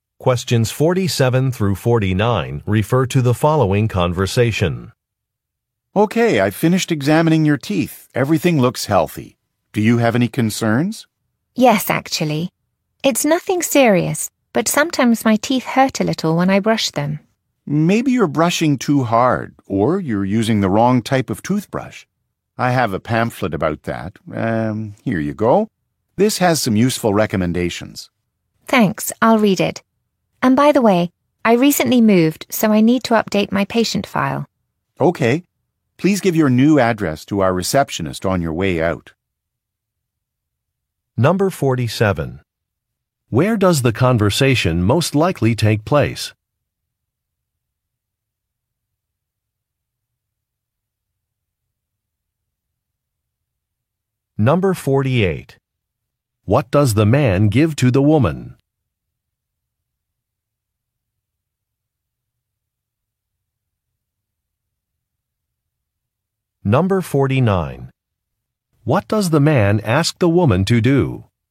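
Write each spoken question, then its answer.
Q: Where does the conversation most likely take place?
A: At a dentist's office

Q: What does the man give to the woman?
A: A pamphlet with recommendations

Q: What does the man ask the woman to do?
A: Give her new address to the receptionist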